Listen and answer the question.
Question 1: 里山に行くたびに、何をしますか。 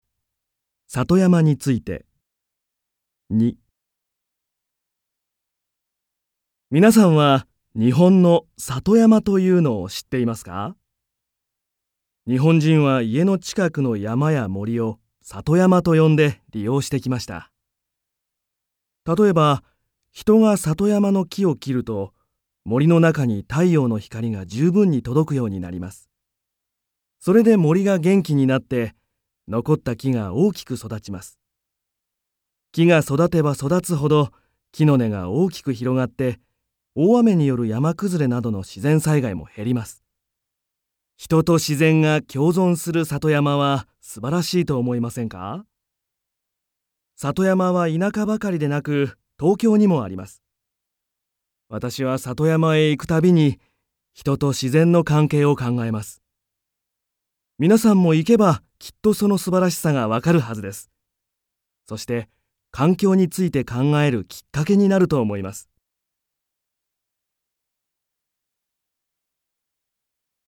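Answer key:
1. 人と自然の関係を考えます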